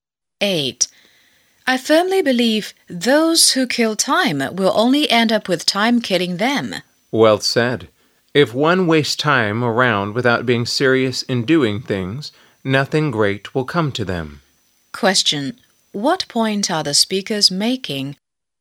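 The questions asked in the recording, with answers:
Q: What point are the speakers making?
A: We shouldn't waste time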